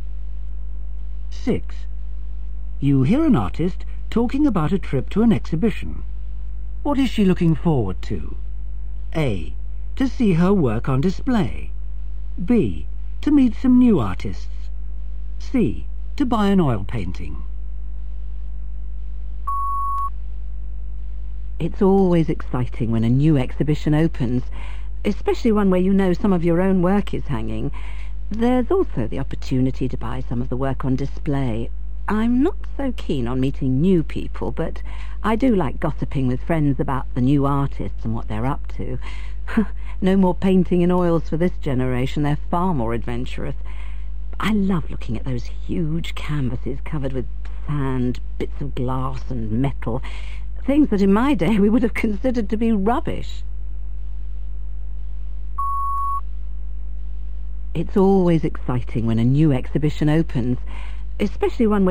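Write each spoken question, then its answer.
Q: What is she looking forward to?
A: A: To see her work on display.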